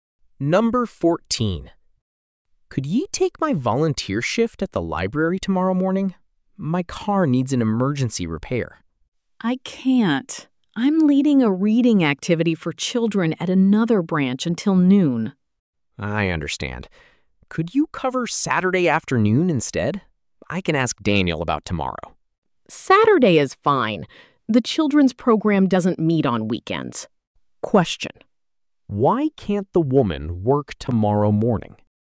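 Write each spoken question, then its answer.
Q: why can't the woman work tomorrow morning?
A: She is leading a children's reading activity at another branch until noon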